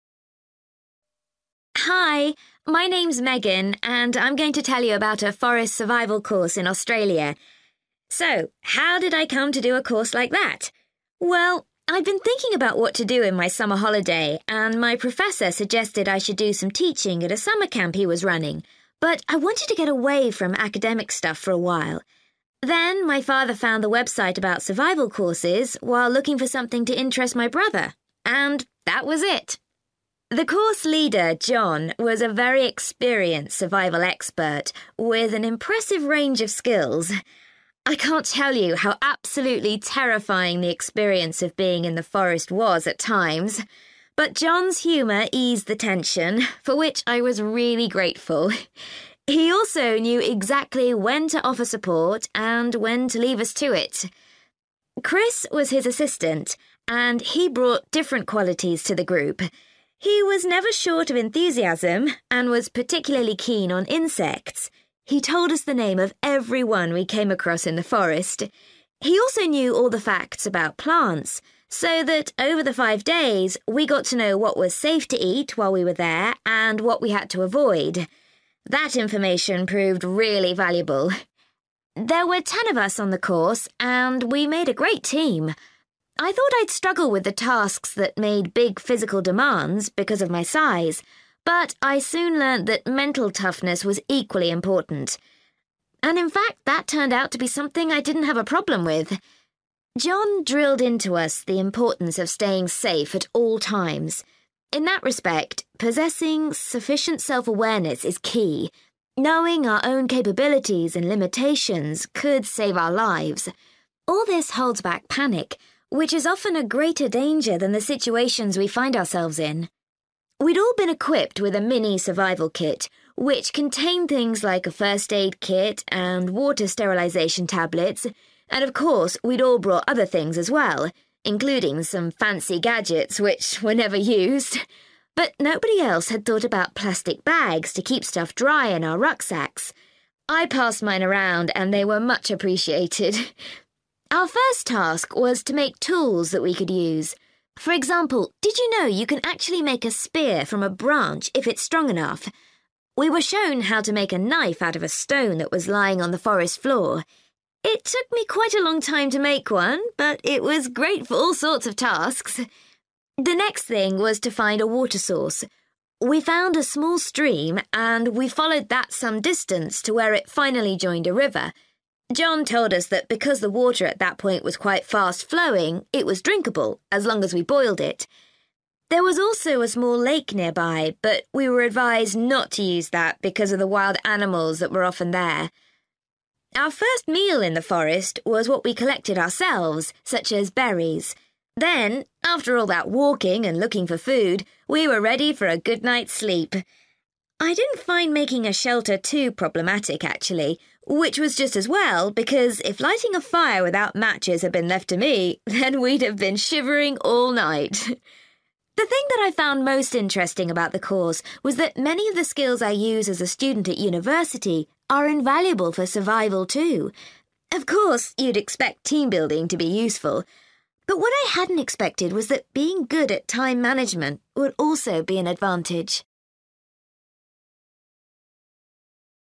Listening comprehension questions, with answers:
For questions 9-18, complete the sentences with a word or short phrase.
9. It was Megan's (9) .......................................... who told her about the survival course.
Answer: father

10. Megan particularly appreciated the course leader John's use of (10) .......................................... at stressful moments.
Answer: humour/humor

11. Megan said the assistant's knowledge of (11) .......................................... was very useful during the course.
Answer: plants

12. Megan was worried that her (12) .......................................... would be a problem in doing some of the tasks.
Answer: (physical) size

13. John emphasised that when it comes to safety, (13) .......................................... is the most dangerous reaction.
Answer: panic

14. Megan's teammates were grateful for the (14) .......................................... which she'd brought with her.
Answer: (plastic) bags

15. Megan learned how to make a (15) .......................................... from the material found in the forest.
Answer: knife

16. Megan and her group were told they should only use water from the (16) .......................................... for drinking.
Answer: river

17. Megan found that making a (17) .......................................... was hard for her.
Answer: fire (without matches)

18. Megan was surprised to find that the skill of (18) .......................................... benefited her.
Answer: (being good at) time management

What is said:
Hi, my name's Megan and I'm going to tell you about a forest survival course in Australia. So how did I come to do a course like that? Well, I'd been thinking about what to do in my summer holiday and my professor suggested I should do some teaching at a summer camp he was running, but I wanted to get away from academic stuff for a while. Then my father found the website about survival courses while looking for something to interest my brother. And that was it!
The course leader, John, was a very experienced survival expert with an impressive range of skills. I can't tell you how absolutely terrifying the experience of being in the forest was at times but John's humour eased the tension, for which I was really grateful. He also knew exactly when to offer support and when to leave us to it.
Chris was his assistant, and he brought different qualities to the group. He was never short of enthusiasm, and was particularly keen on insects – he told us the name of every one we came across in the forest. He also knew all the facts about plants so that over the five days, we got to know what was safe to eat while we were there and what we had to avoid. That information proved really valuable.
There were ten of us on the course and we made a great team. I thought I'd struggle with the tasks that made big physical demands because of my size, but I soon learnt that mental toughness was equally important. And in fact that turned out to be something I didn't have a problem with.
John drilled into us the importance of staying safe at all times. In that respect, possessing sufficient self-awareness is key ... knowing our own capabilities and limitations could save our lives. All this holds back panic, which is often a greater danger than the situations we find ourselves in.
We'd all been equipped with a mini survival kit which contained things like a first aid kit and water sterilisation tablets, and of course we'd all brought other things as well, including some fancy gadgets which were never used ... but nobody else had thought about plastic bags to keep stuff dry in our rucksacks. I passed mine around and they were much appreciated.
Our first task was to make tools that we could use. For example, did you know you can actually make a spear from a branch if it's strong enough? We were shown how to make a knife out of a stone that was lying on the forest floor. It took me quite a long time to make one but it was great for all sorts of tasks.
The next thing was to find a water source. We found a small stream and we followed that some distance to where it finally joined a river. John told us that because the water at that point was quite fast-flowing, it was drinkable as long as we boiled it. There was also a small lake nearby but we were advised not to use that because of the wild animals that were often there.
Our first meal in the forest was what we collected ourselves, such as berries. Then, after all that walking and looking for food, we were ready for a good night's sleep. I didn't find making a shelter too problematic actually, which was just as well because if lighting a fire without matches had been left to me, then we'd have been shivering all night!
The thing that I found most interesting about the course was that many of the skills I use as a student at university are invaluable for survival too. Of course, you'd expect team-building to be useful. But what I hadn't expected was that being good at time management would also be an advantage.